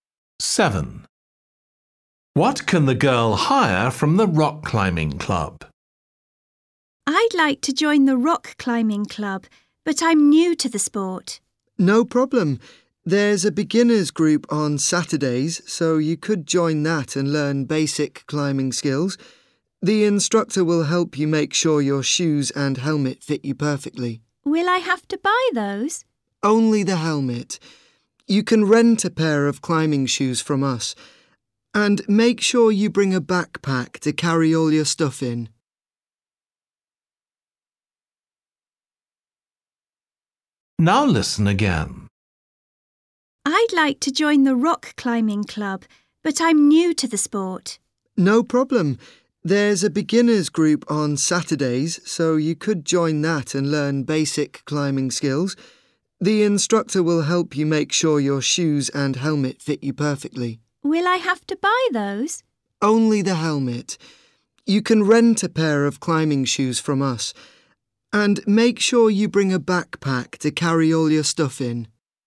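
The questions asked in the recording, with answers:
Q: What can the girl hire from the rock climbing club?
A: climbing shoes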